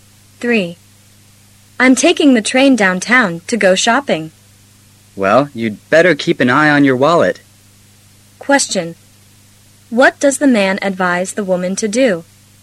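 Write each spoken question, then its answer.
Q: What does the man advise the woman to do?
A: Watch her wallet carefully.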